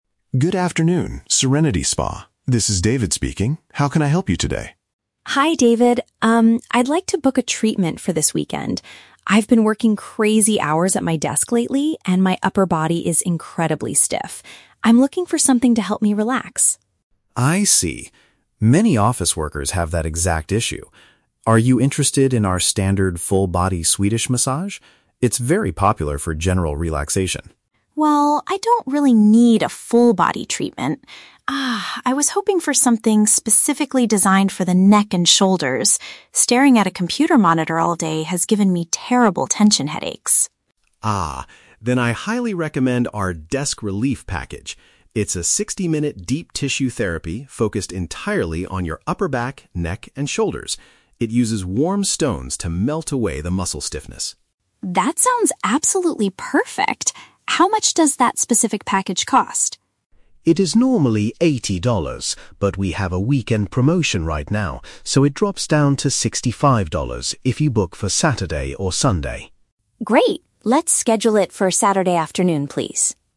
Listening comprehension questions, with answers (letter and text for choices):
Listen to the phone conversation between a customer (Emily) and a spa receptionist (David), and choose the correct answer (A, B, or C).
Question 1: What is the main reason Emily wants to get a spa treatment?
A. She wants to cure the physical discomfort caused by her computer work.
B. She wants to try the standard full-body Swedish massage for the first time.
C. She needs to recover from a serious sports injury she got last weekend.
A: A. She wants to cure the physical discomfort caused by her computer work.

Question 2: What is a key feature of the "Desk Relief" package?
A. It provides a relaxing treatment for the customer's entire body.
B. It concentrates exclusively on the upper sections of the body.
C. It uses cold stones to reduce swelling in the neck and shoulders.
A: B. It concentrates exclusively on the upper sections of the body.

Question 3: How much will Emily pay for her appointment?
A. $80, because it is the regular price for a deep tissue therapy session.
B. $50, because she has a special discount code for office workers.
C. $65, because she is scheduling her visit during the promotional weekend.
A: C. $65, because she is scheduling her visit during the promotional weekend.

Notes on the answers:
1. Emily says she has been "working crazy hours at my desk" and "staring at a computer monitor all day," which makes her upper body "stiff" and gives her "tension headaches." "Physical discomfort" is a paraphrase of stiffness and headaches.
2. David explains that the package is "focused entirely on your upper back, neck, and shoulders." "Concentrates exclusively on the upper sections" is a direct paraphrase of this description.
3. David says the price "drops down to $65 if you book for Saturday or Sunday" (the weekend). Emily agrees and schedules it for "Saturday afternoon."

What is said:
David: Good afternoon, Serenity Spa. This is David speaking. How can I help you today?
Emily: Hi, David. Um, I'd like to book a treatment for this weekend. I've been working crazy hours at my desk lately, and my upper body is incredibly stiff. I'm looking for something to help me relax.
David: I see. Many office workers have that exact issue. Are you interested in our standard full-body Swedish massage? It's very popular for general relaxation.
Emily: Well, I don't really need a full-body treatment. Ah, I was hoping for something specifically designed for the neck and shoulders. Staring at a computer monitor all day has given me terrible tension headaches.
David: Ah, then I highly recommend our "Desk Relief" package. It's a 60-minute deep tissue therapy focused entirely on your upper back, neck, and shoulders. It uses warm stones to melt away the muscle stiffness.
Emily: That sounds absolutely perfect! How much does that specific package cost?
David: It is normally $80, but we have a weekend promotion right now, so it drops down to $65 if you book for Saturday or Sunday.